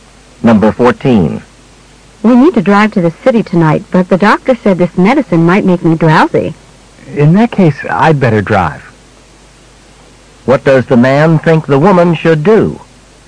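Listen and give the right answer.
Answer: Let him drive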